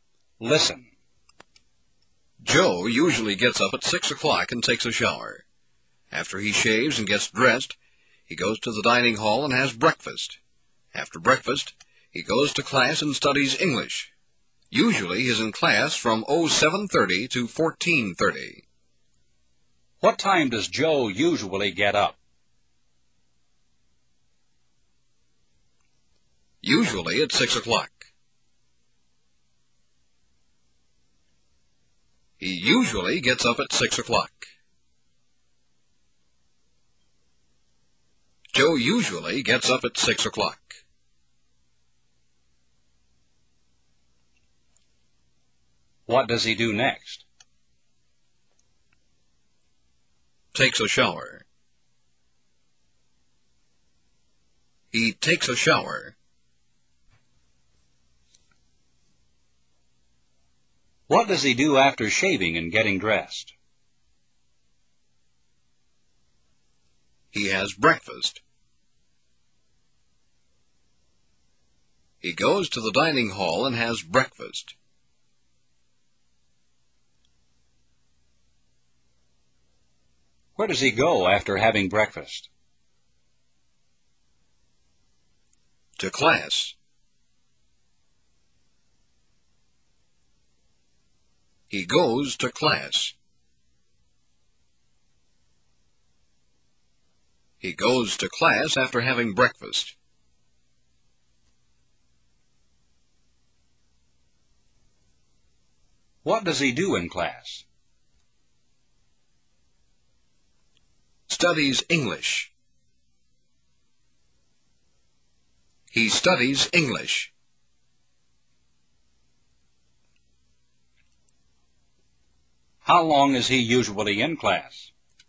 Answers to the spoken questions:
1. Usually at 6 o'clock. He usually gets up at 6 o'clock.
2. Takes a shower. He takes a shower.
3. He has breakfast. He goes to the dining hall and has breakfast.
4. To class. He goes to class.
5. Studies English. He studies English.
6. From 07:30 to 14:30. He's usually in class from 07:30 to 14:30.